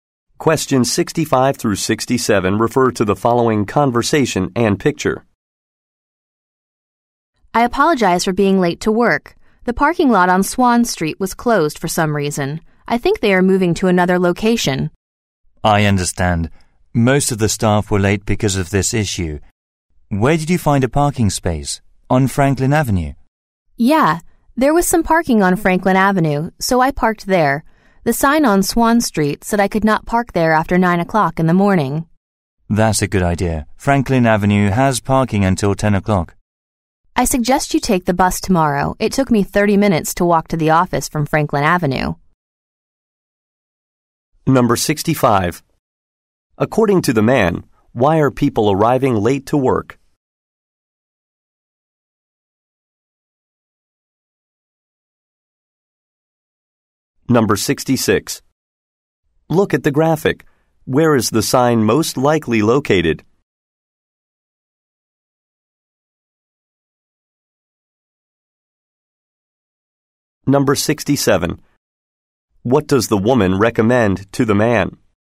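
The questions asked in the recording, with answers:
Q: According to the man, why are people arriving late to work?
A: The parking lot on Swan Street was closed

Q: What does the woman recommend to the man?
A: Take the bus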